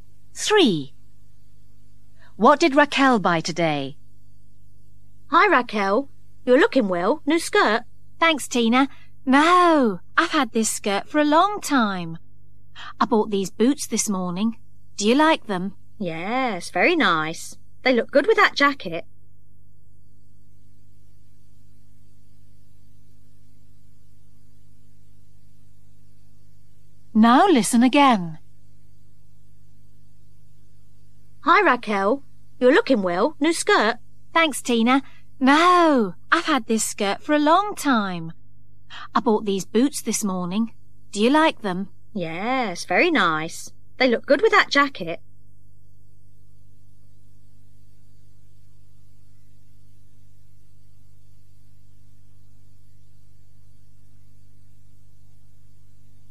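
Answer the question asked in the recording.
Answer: Boots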